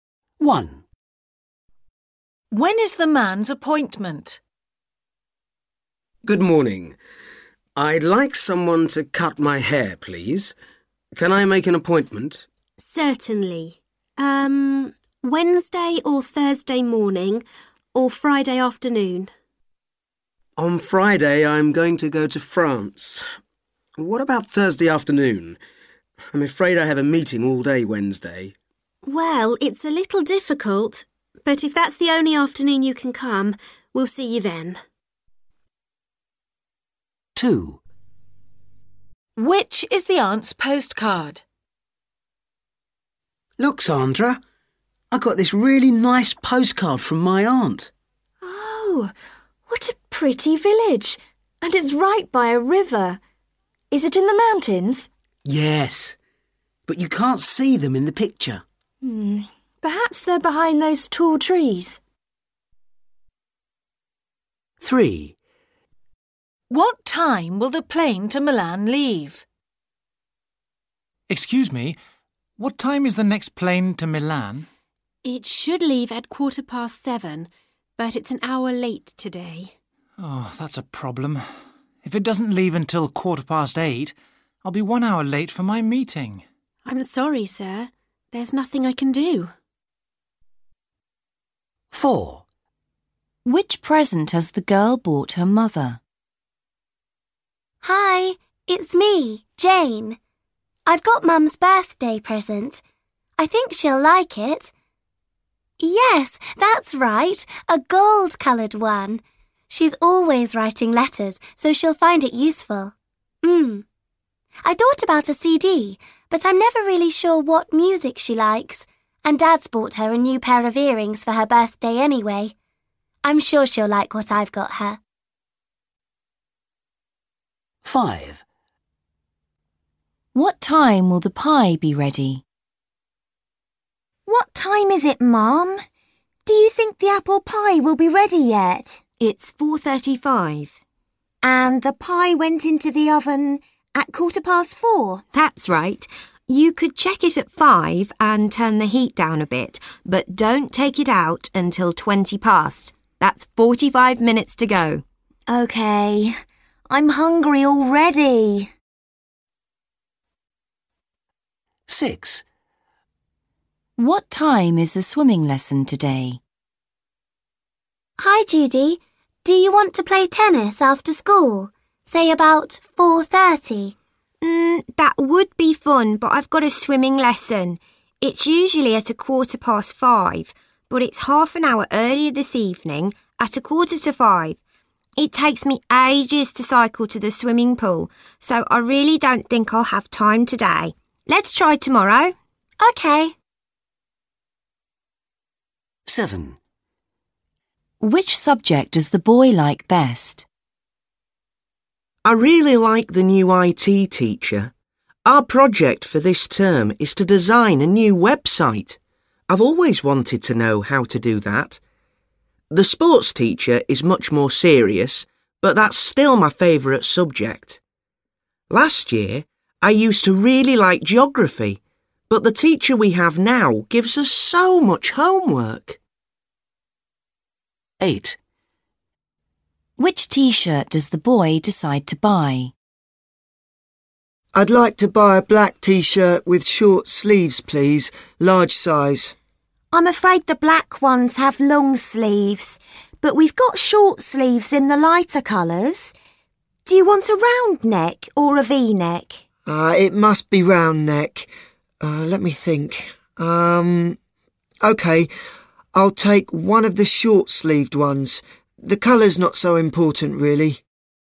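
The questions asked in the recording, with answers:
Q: When is the man's appointment?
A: Thursday afternoon

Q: What time will the plane to Milan leave?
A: 8:15

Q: What time will the pie be ready?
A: 5:20

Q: What time is the swimming lesson today?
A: 4:45

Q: Which subject does the boy like best?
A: sport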